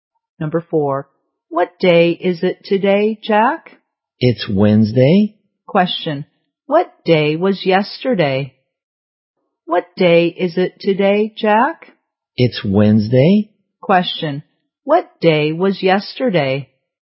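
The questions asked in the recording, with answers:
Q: what day was yesterday?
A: Tuesday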